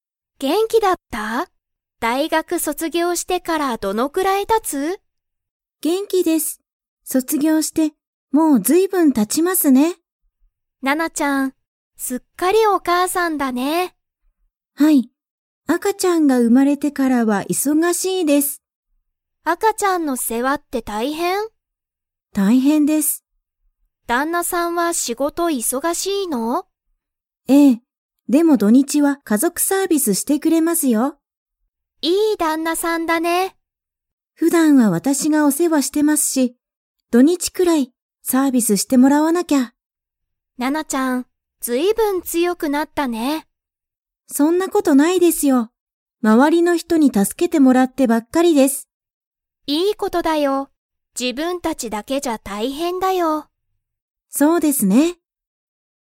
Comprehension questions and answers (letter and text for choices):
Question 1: ナナは、すっかり だ。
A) お母かあさん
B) お父とうさん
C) 旦那だんなさん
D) 赤あかちゃん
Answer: A) お母かあさん

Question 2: 旦那だんなさんは、仕事しごとが 。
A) 忙いそがしい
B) 忙いそがしくない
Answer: A) 忙いそがしい

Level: Level 4